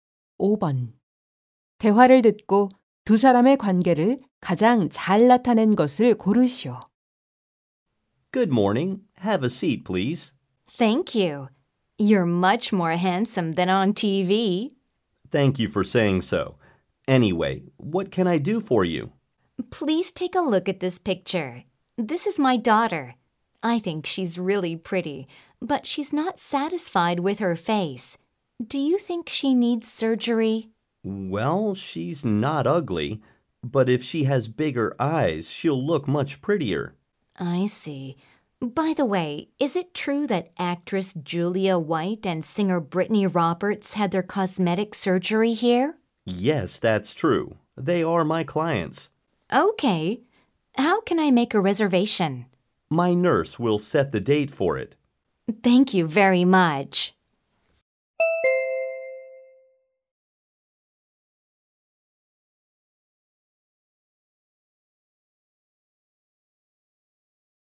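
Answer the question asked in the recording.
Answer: 성형외과 의사 - 환자 어머니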